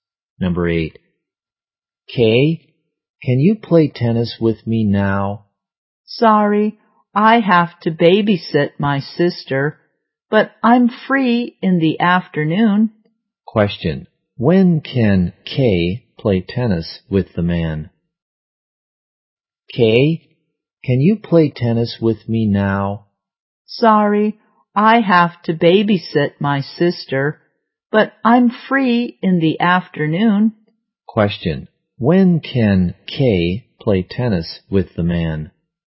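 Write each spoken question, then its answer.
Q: When can Kay play tennis with the man?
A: In the afternoon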